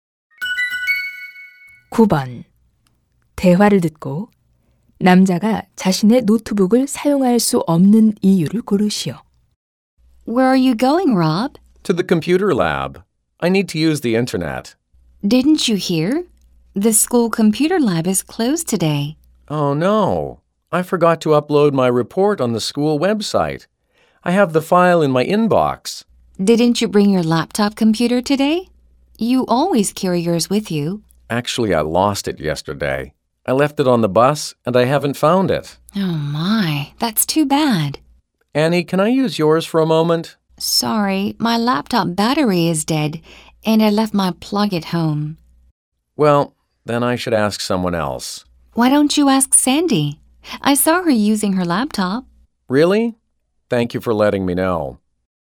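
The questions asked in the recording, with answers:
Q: 대화를 듣고 남자가 자신의 노트북을 사용할 수 없는 이유를 고르시오.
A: 버스에 두고 내려 잃어버려서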